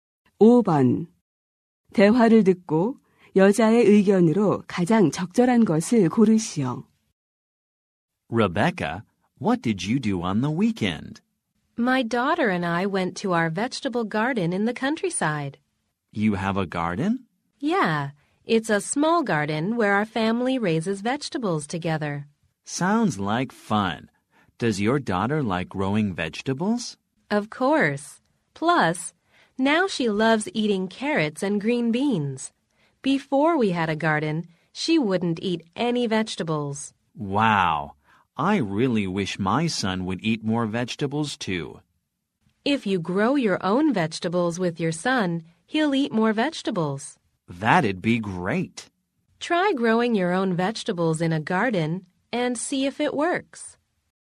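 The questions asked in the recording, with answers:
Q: 대화를 듣고 여자의 의견으로 가장 적절한 것을 고르시오.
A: 채소를 직접 기르면 아이가 채소를 더 잘 먹게 된다.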